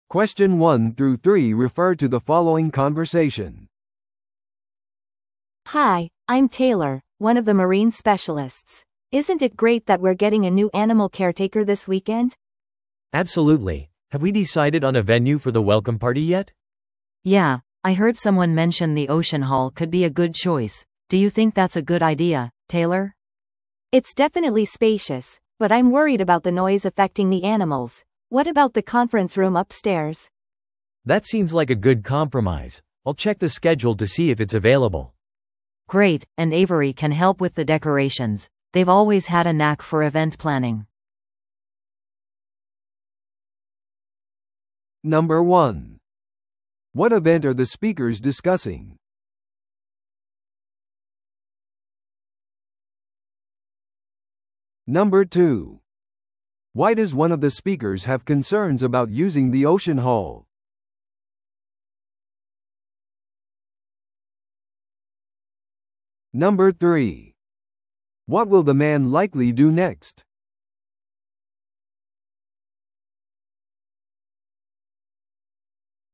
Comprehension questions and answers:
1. What event are the speakers discussing?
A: 新しい世話人の歓迎会。

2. Why does one of the speakers have concerns about using the Ocean Hall?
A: 動物にとってうるさすぎるかもしれない。

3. What will the man likely do next?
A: 部屋の空き状況をスケジュールで確認する。

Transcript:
A: Hi, I'm Taylor, one of the marine specialists. Isn't it great that we're getting a new animal caretaker this weekend?
B: Absolutely. Have we decided on a venue for the welcome party yet?
C: Yeah, I heard someone mention the Ocean Hall could be a good choice. Do you think that's a good idea, Taylor?
A: It's definitely spacious, but I'm worried about the noise affecting the animals. What about the conference room upstairs?
B: That seems like a good compromise. I'll check the schedule to see if it's available.
C: Great, and Avery can help with the decorations. They've always had a knack for event planning.